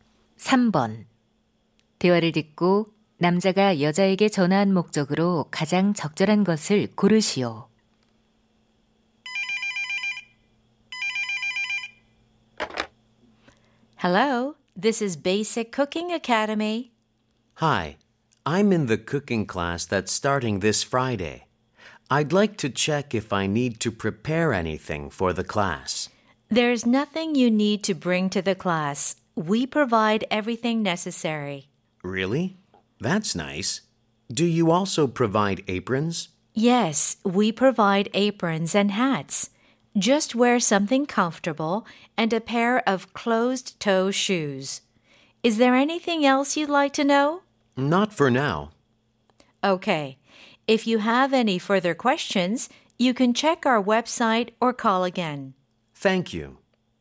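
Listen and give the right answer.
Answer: 수업 준비물을 확인하려고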